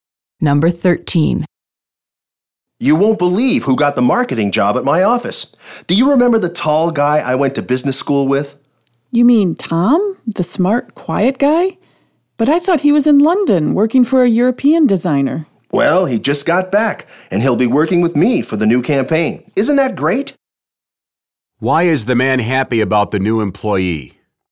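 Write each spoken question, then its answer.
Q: Why is the man happy about the new employee?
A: It's his old business school classmate Tom, who will work with him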